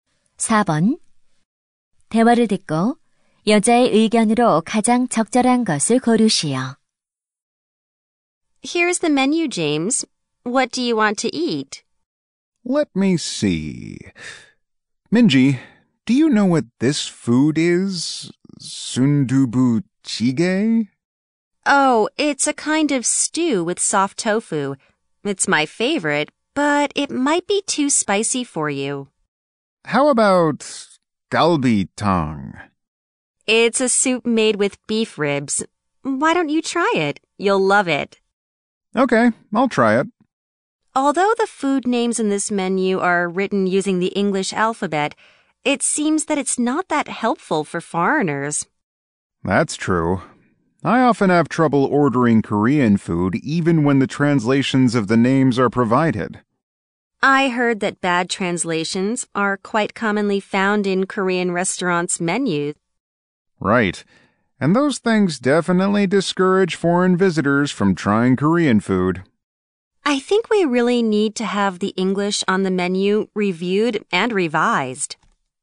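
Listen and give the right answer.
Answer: 식당 메뉴의 영어 번역을 검토하고 수정해야 한다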